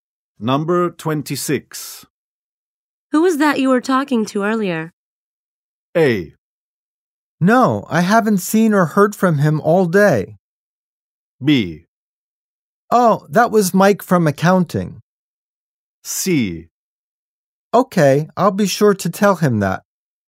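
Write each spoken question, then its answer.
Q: Who was that you were talking to earlier?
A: B: Oh, that was Mike from accounting.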